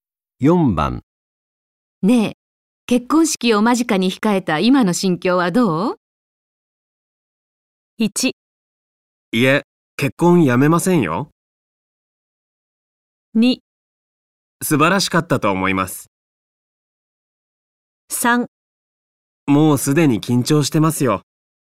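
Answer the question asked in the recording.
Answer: 3: もうすでに緊張してますよ。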